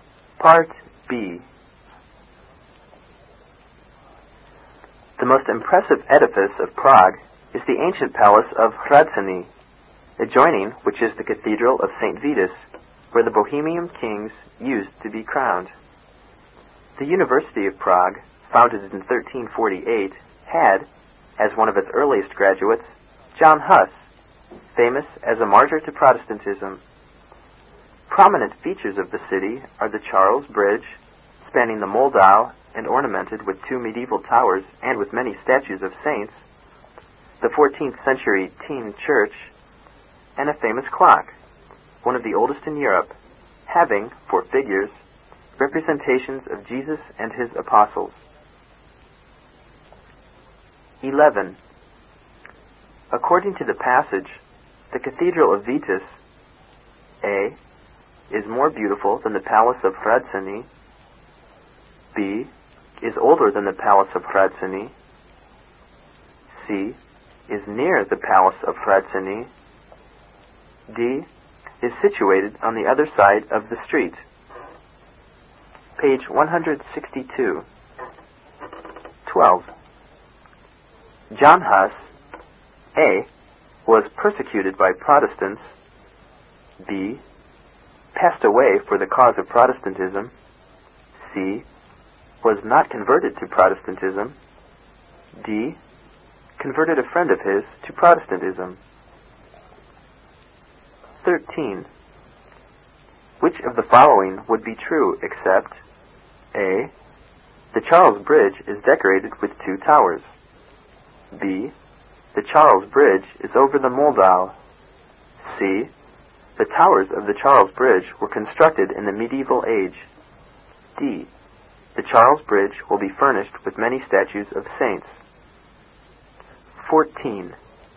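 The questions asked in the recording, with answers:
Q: According to the passage, the Cathedral of Vitus,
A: C: is near the Palace of Hradčany.

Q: John Huss,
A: B: Passed away for the cause of Protestantism.

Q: Which of the following would be true except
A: D: The Charles Bridge will be furnished with many statues of saints.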